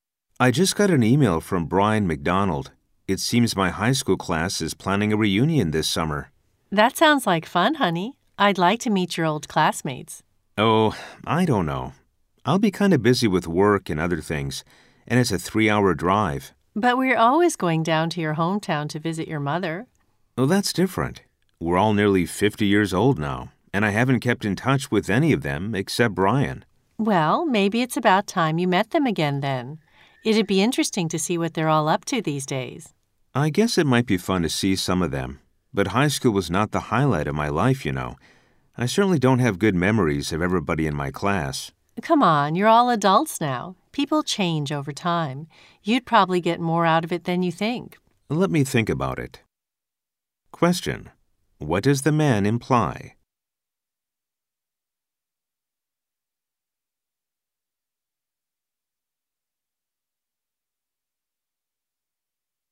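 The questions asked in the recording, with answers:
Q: What does the man imply?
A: He is not very eager to go to his high school reunion.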